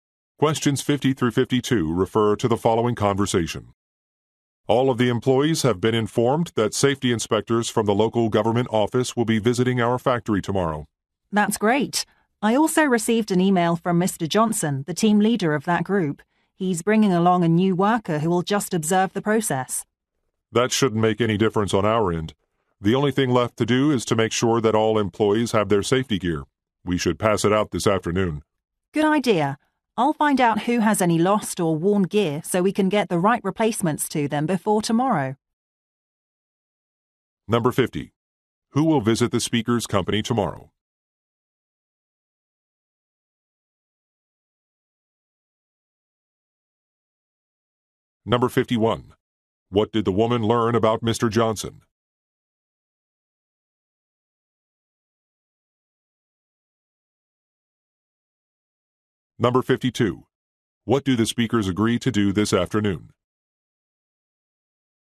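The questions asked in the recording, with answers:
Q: Who will visit the speaker's company tomorrow?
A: Safety inspectors from the local government

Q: What did the woman learn about Mr.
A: He is bringing a new worker who will observe

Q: What do the speakers agree to do this afternoon?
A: Hand out safety gear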